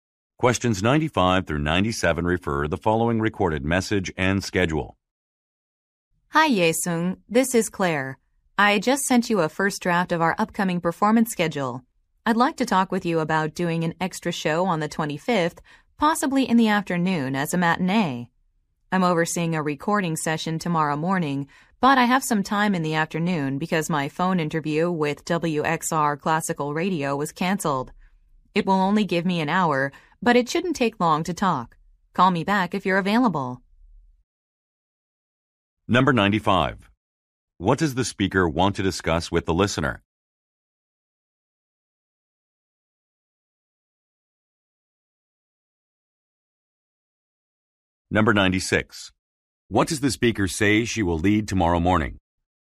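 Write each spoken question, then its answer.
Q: What does the speaker want to discuss with the listener?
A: Adding an extra show on the 25th

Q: What does the speaker say she will lead tomorrow morning?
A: A recording session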